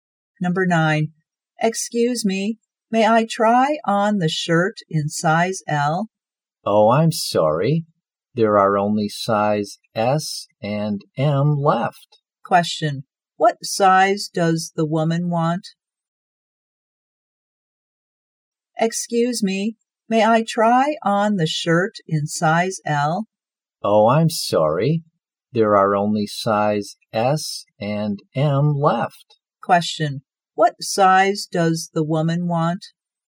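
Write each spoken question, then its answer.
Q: What size does the woman want?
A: Size L.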